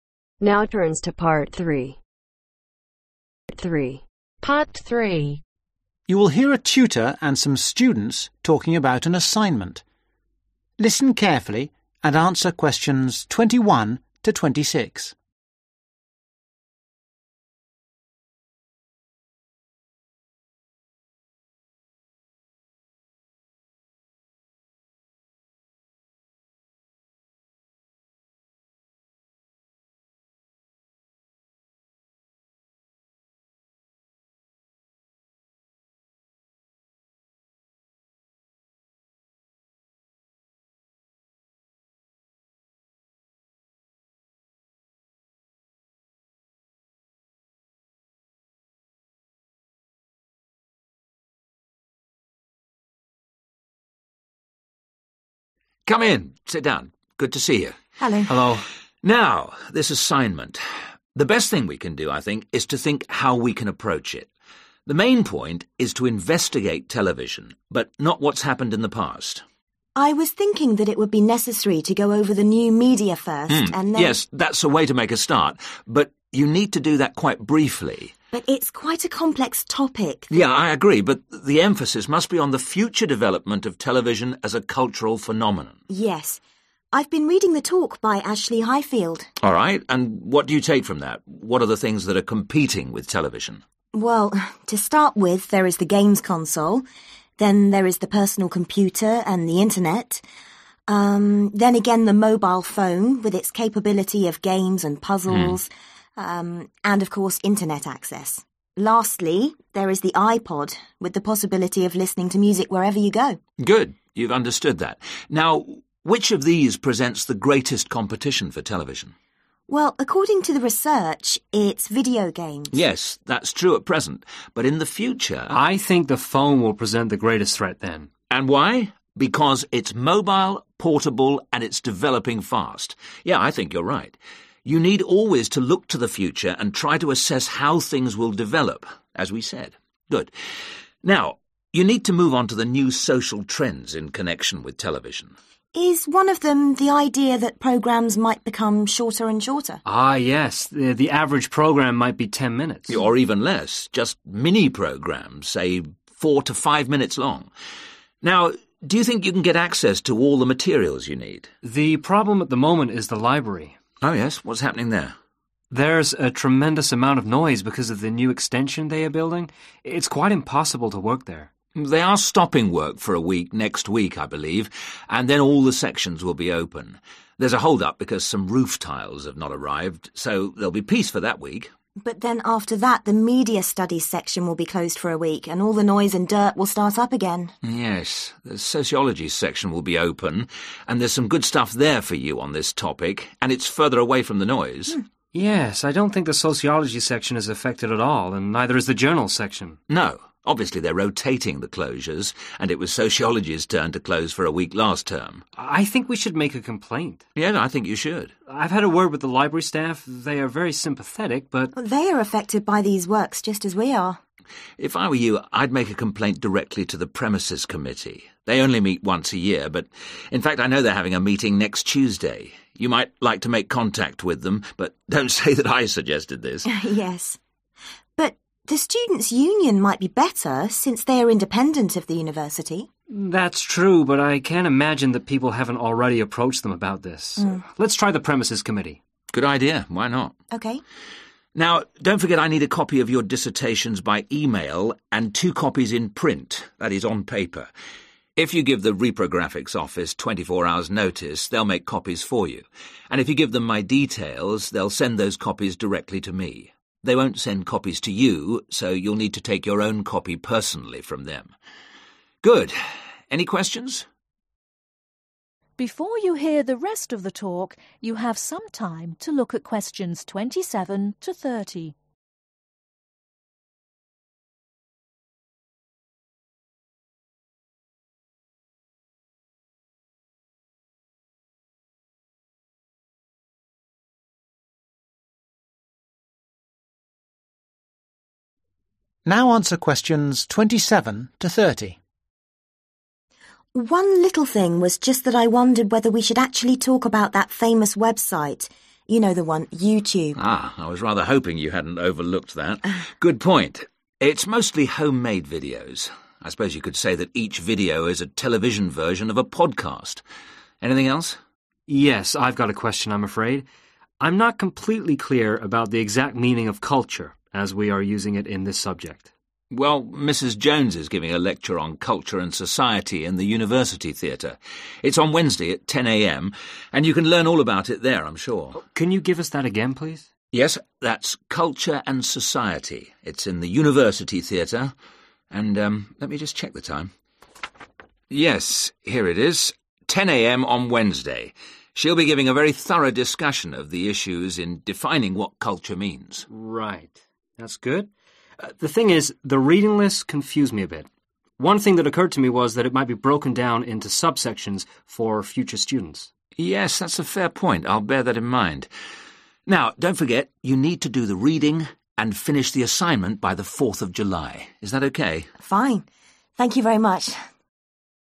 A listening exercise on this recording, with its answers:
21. What is the main topic of the assignment ?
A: the cultural future of television

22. according to Emile, which new technology will become the biggest competition for television ?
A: mobile phones

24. What part of the library is going to be closed for one week ?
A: the Media Studies section

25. Which body do they decide to complain to ?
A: the Premises Committee

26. What will the re-pro-graphics office do ?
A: send your dissertation to your tutor

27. What does the tutor compare homemade videos with ?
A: a podcast

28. What is the title Mrs Jones's lecture ?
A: Culture and Society

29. where is the lecture ?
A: The university Theatre

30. When is the final date for the assignment ?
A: 4 July